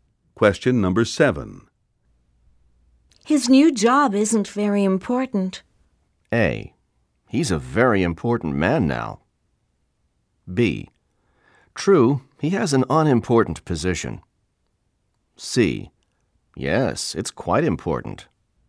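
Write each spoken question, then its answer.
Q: His new job isn't very important.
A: B: True, he has an unimportant position.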